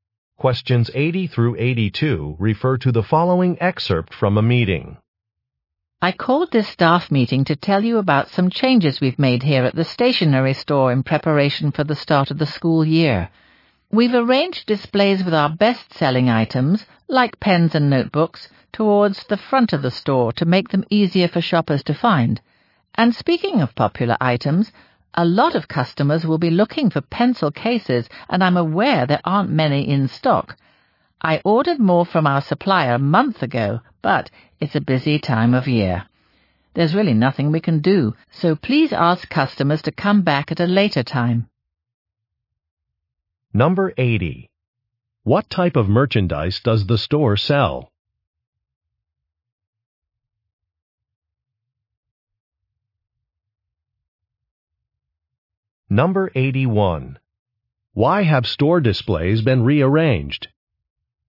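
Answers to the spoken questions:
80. Stationery
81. To make popular items easier to find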